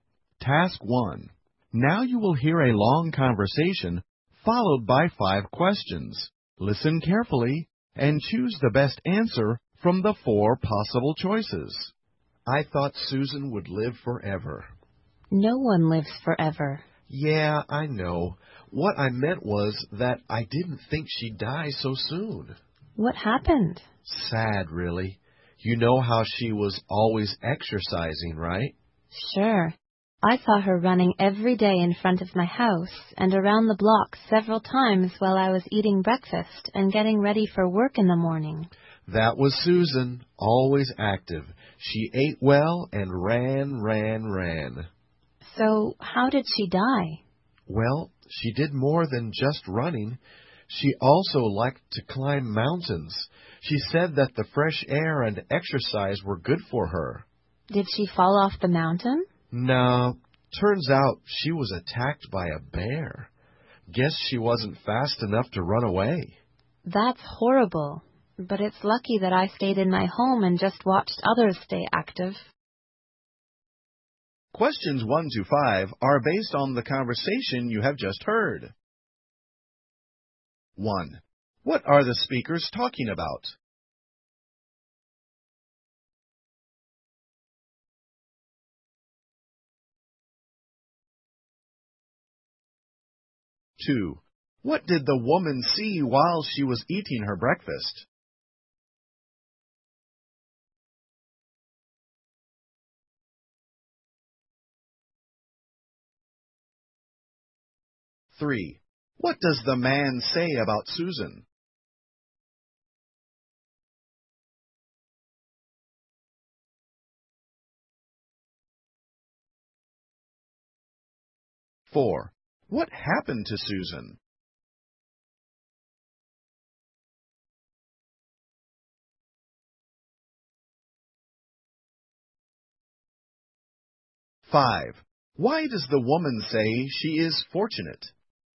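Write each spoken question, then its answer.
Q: What are the speakers talking about?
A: Susan's death.

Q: What did the woman see while she was eating her breakfast?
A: Susan running in front of her house and around the block.

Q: What does the man say about Susan?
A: She was always active; she ate well and ran.

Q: What happened to Susan?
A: She was attacked by a bear while mountain climbing.

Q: Why does the woman say she is fortunate?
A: She stayed home and just watched others stay active.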